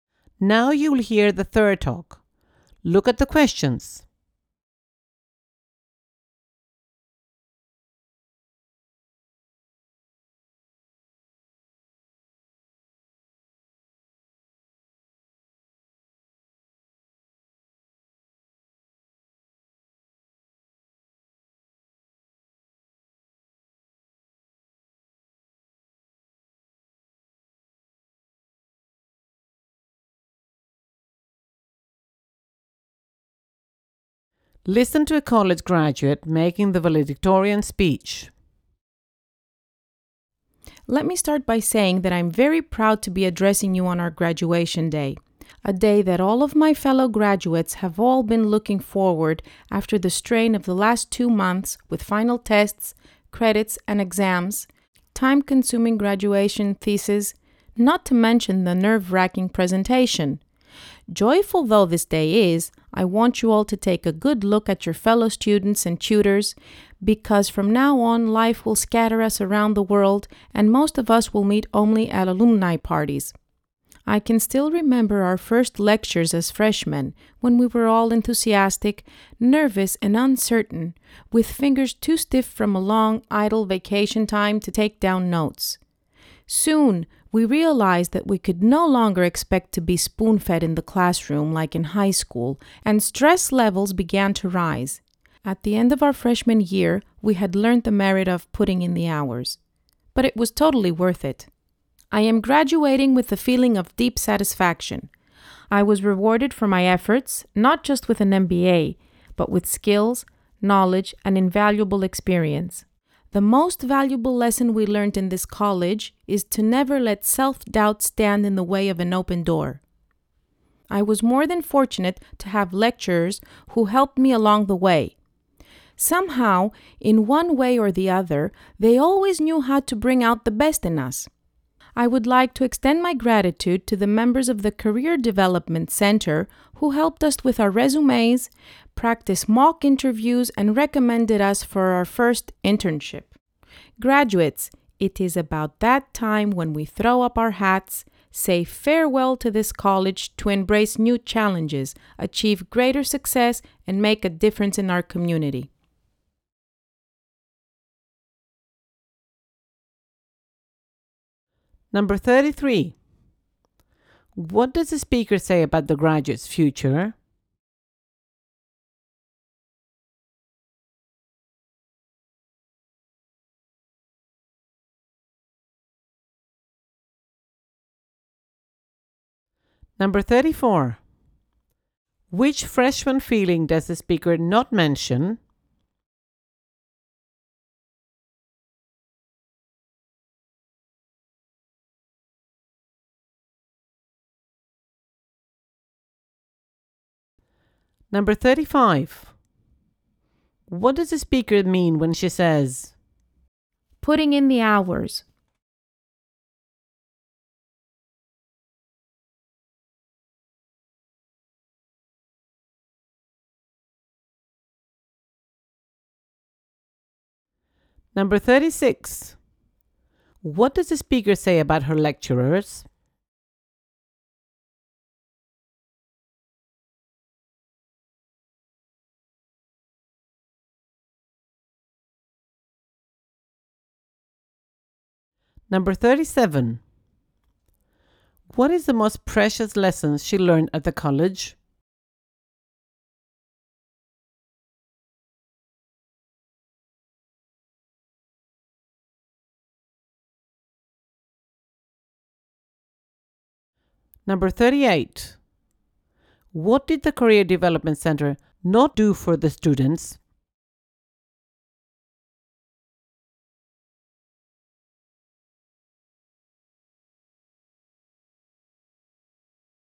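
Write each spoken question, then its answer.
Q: What does the speaker say about the graduate's future?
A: Life will scatter them around the world, and most will meet only at alumni parties

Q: What does the speaker say about her lecturers?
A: They helped her and always knew how to bring out the best in the students

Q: What is the most precious lesson she learned at the college?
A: Never let self-doubt stand in the way of an open door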